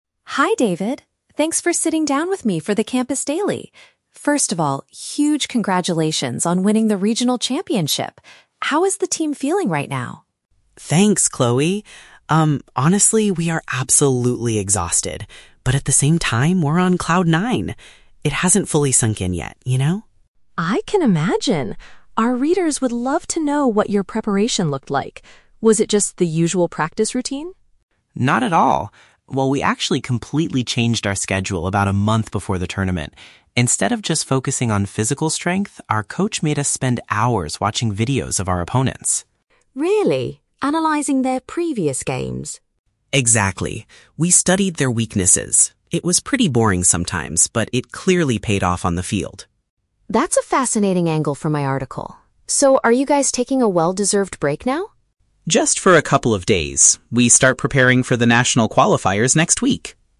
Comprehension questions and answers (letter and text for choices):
Listen to an interview between a student reporter and a team captain. Choose the correct answer (A, B, or C) for each question.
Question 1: How does the team currently feel about their victory?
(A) They are extremely happy but physically tired.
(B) They are feeling disappointed because it hasn't sunk in.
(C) They are highly stressed about their upcoming exams.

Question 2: How did the team change their training before the tournament?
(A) They increased the amount of time spent lifting weights.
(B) They started reviewing recorded footage of the other teams.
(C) They hired a new coach to help them design a new strategy.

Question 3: What is the team's plan for the immediate future?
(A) To go on a long vacation to celebrate their big win.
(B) To give more interviews to local television stations.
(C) To return to training shortly for the next level of competition.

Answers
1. (A) They are extremely happy but physically tired.
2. (B) They started reviewing recorded footage of the other teams.
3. (C) To return to training shortly for the next level of competition.

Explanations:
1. David says they are "absolutely exhausted" (physically tired) but also "on cloud nine" (extremely happy). Option B is the Trap: The phrase "hasn't fully sunk in" is used in the audio, but they are not disappointed about it. Option C is a plausible student problem, but it is not mentioned.
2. David mentions that they spent hours "watching videos of our opponents" and analyzing their previous games. Option B paraphrases this perfectly (videos = recorded footage; opponents = other teams). Option A is the Trap: "Physical strength" is mentioned, but David explicitly says they did not just focus on that ("Instead of just focusing on..."). Option C is not mentioned.
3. David says they will only rest for a couple of days and then "start preparing for the national qualifiers next week". Option C uses synonyms to express this (start preparing = return to training; national qualifiers = next level of competition). Option A is the Trap: The reporter asks if they are taking a "well-deserved break" (vacation), but David clarifies it is only for a few days, not a long one. Option B is plausible but never mentioned.

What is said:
Chloe: Hi David! Thanks for sitting down with me for the Campus Daily. First of all, huge congratulations on winning the regional championship! How is the team feeling right now?
David: Thanks, Chloe. Um, honestly, we are absolutely exhausted, but at the same time, we're on cloud nine. It hasn't fully sunk in yet, you know?
Chloe: I can imagine! Our readers would love to know what your preparation looked like. Was it just the usual practice routine?
David: Not at all. Well, we actually completely changed our schedule about a month before the tournament. Instead of just focusing on physical strength, our coach made us spend hours watching videos of our opponents.
Chloe: Really? Analyzing their previous games?
David: Exactly. We studied their weaknesses. It was pretty boring sometimes, but it clearly paid off on the field.
Chloe: That's a fascinating angle for my article. So, are you guys taking a well-deserved break now?